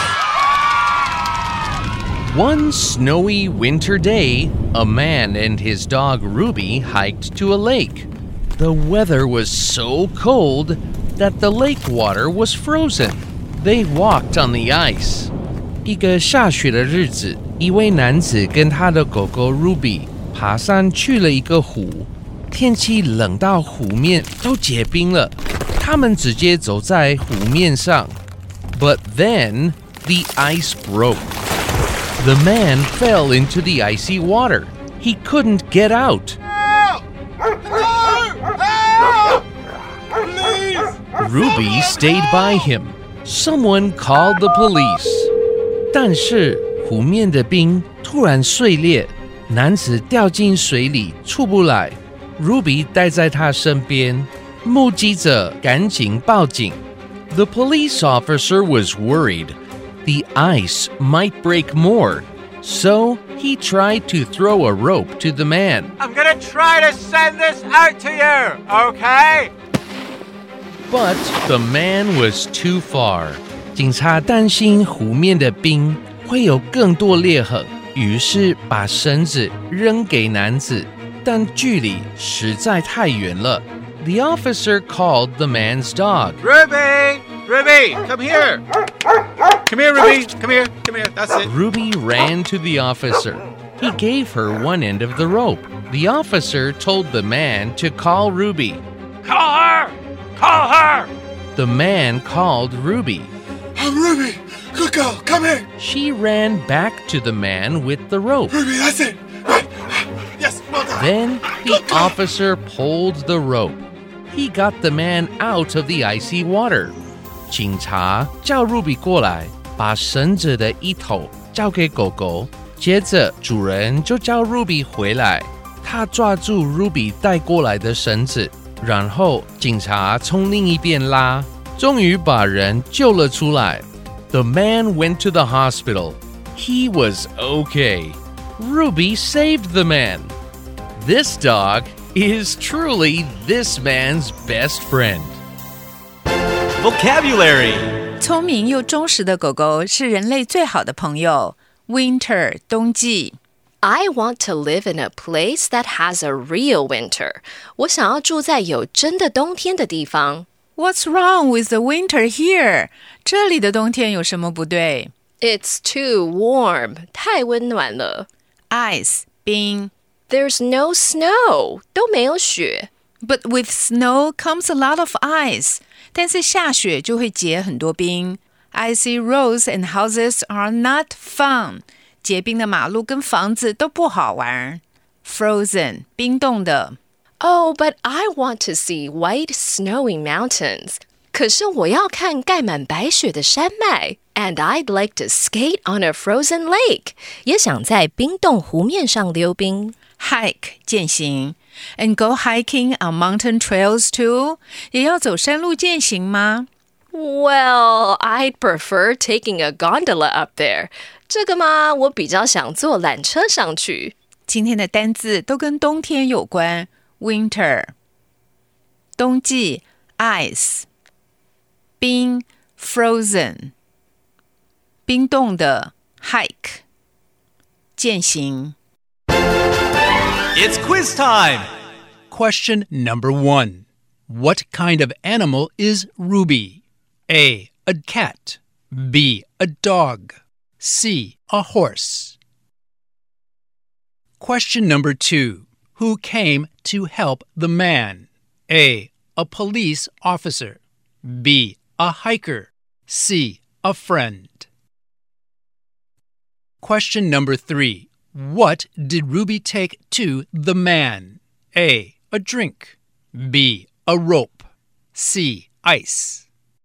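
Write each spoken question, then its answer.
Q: What kind of animal is Ruby?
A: B: A dog.

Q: Who came to help the man?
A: A: A police officer.

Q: What did Ruby take to the man?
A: B: A rope.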